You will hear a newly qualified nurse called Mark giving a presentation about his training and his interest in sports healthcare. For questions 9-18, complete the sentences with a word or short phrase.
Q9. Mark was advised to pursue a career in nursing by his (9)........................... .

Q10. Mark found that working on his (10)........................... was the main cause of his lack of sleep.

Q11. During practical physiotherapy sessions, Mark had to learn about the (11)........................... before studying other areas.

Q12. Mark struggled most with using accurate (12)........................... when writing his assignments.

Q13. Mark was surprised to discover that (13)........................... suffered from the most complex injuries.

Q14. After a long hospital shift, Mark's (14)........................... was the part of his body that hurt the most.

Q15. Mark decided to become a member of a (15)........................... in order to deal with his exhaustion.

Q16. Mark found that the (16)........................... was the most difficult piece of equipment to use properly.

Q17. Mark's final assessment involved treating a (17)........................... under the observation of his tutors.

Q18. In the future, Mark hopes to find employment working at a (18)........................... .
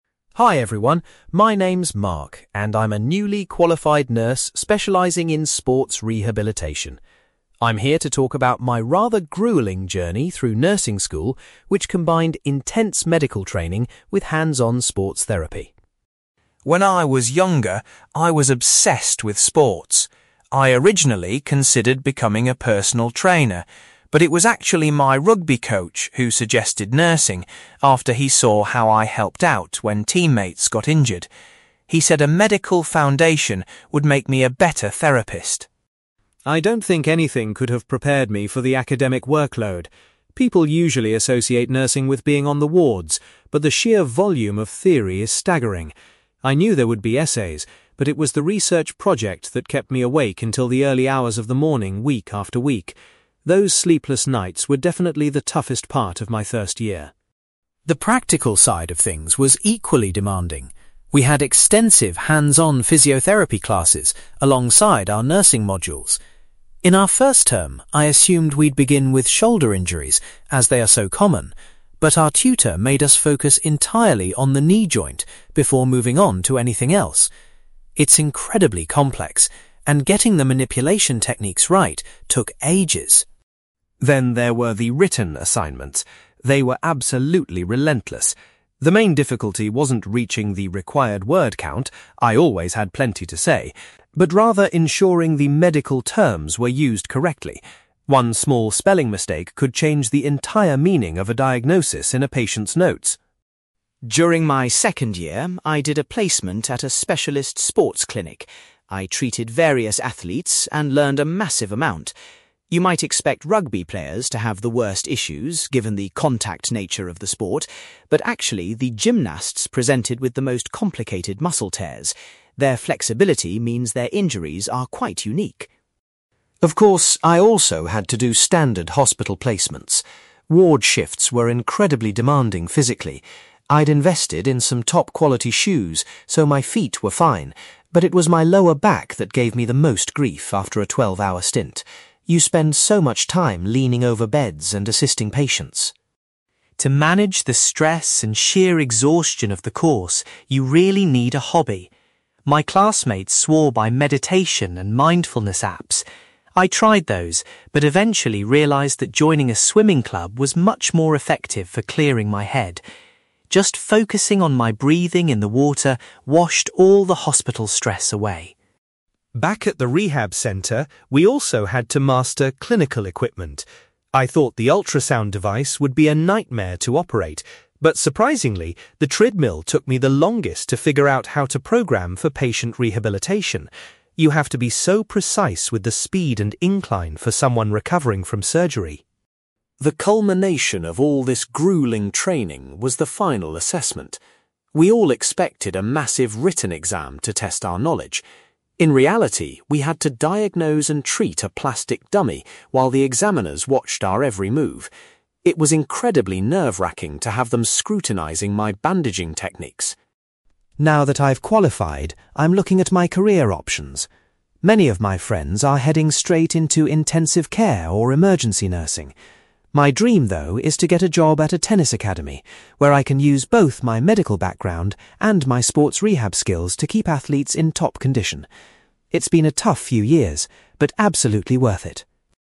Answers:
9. rugby coach
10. research project
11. knee joint
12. medical terms
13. gymnasts
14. lower back
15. swimming club
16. treadmill
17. plastic dummy
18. tennis academy

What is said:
Mark: Hi everyone, my name is Mark, and I'm a newly qualified nurse specializing in sports rehabilitation. I'm here to talk about my rather grueling journey through nursing school, which combined intense medical training with hands-on sports therapy.
When I was younger, I was obsessed with sports. I originally considered becoming a personal trainer, but it was actually my rugby coach who suggested nursing after he saw how I helped out when teammates got injured. He said a medical foundation would make me a better therapist.
I don't think anything could have prepared me for the academic workload. People usually associate nursing with being on the wards, but the sheer volume of theory is staggering. I knew there would be essays, but it was the research project that kept me awake until the early hours of the morning week after week. Those sleepless nights were definitely the toughest part of my first year.
The practical side of things was equally demanding. We had extensive hands-on physiotherapy classes alongside our nursing modules. In our first term, I assumed we'd begin with shoulder injuries as they are so common, but our tutor made us focus entirely on the knee joint before moving on to anything else. It's incredibly complex, and getting the manipulation techniques right took ages.
Then there were the written assignments. They were absolutely relentless. The main difficulty wasn't reaching the required word count—I always had plenty to say—but rather ensuring the medical terms were used correctly. One small spelling mistake could change the entire meaning of a diagnosis in a patient's notes!
During my second year, I did a placement at a specialist sports clinic. I treated various athletes and learned a massive amount. You might expect rugby players to have the worst issues given the contact nature of the sport, but actually, the gymnasts presented with the most complicated muscle tears. Their flexibility means their injuries are quite unique.
Of course, I also had to do standard hospital placements. Ward shifts were incredibly demanding physically. I'd invested in some top-quality shoes, so my feet were fine, but it was my lower back that gave me the most grief after a twelve-hour stint. You spend so much time leaning over beds and assisting patients.
To manage the stress and sheer exhaustion of the course, you really need a hobby. My classmates swore by meditation and mindfulness apps. I tried those, but eventually realised that joining a swimming club was much more effective for clearing my head. Just focusing on my breathing in the water washed all the hospital stress away.
Back at the rehab centre, we also had to master clinical equipment. I thought the ultrasound device would be a nightmare to operate, but surprisingly, the treadmill took me the longest to figure out how to program for patient rehabilitation. You have to be so precise with the speed and incline for someone recovering from surgery.
The culmination of all this grueling training was the final assessment. We all expected a massive written exam to test our knowledge. In reality, we had to diagnose and treat a plastic dummy while the examiners watched our every move. It was incredibly nerve-wracking to have them scrutinizing my bandaging techniques!
Now that I've qualified, I'm looking at my career options. Many of my friends are heading straight into intensive care or emergency nursing. My dream, though, is to get a job at a tennis academy, where I can use both my medical background and my sports rehab skills to keep athletes in top condition. It's been a tough few years, but absolutely worth it.

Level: B2